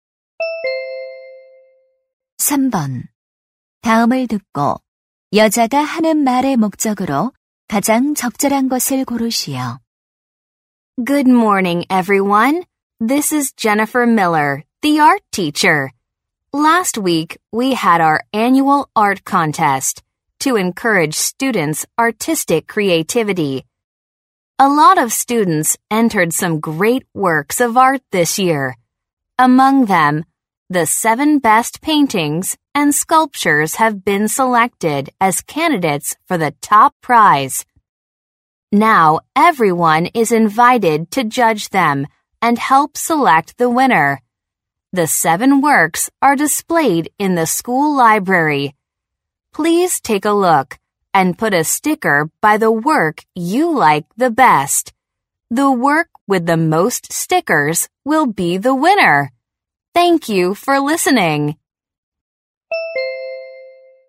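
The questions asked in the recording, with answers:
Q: 다음을 듣고 여자가 하는 말의 목적으로 가장 적절한 것을 고르시오.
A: 미술 대회 우승작 선정 투표에 참여할 것을 요청하려고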